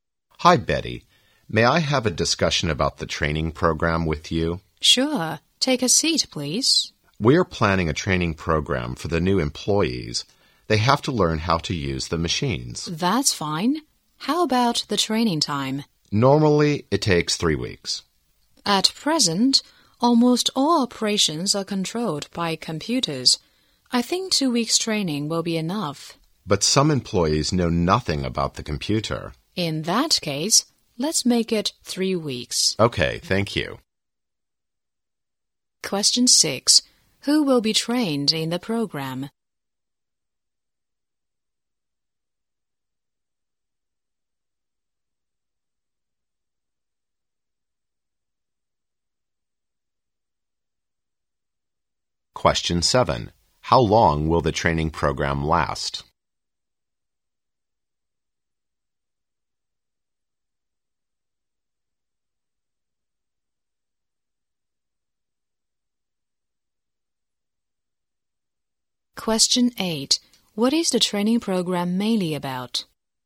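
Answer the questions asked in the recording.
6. The new employees
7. Three weeks
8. How to use the machines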